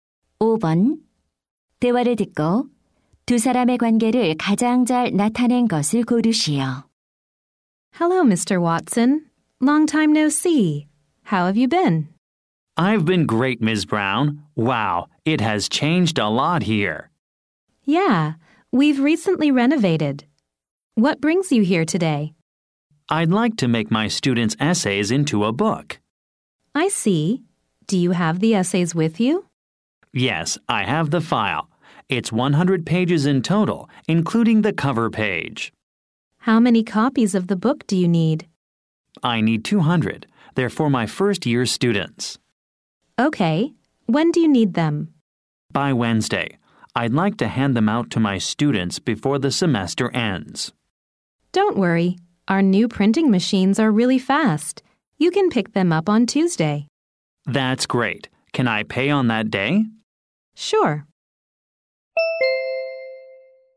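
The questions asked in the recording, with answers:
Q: 대화를 듣고 두 사람의 관계를 가장 잘 나타낸 것을 고르시오.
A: 교사 - 인쇄소 직원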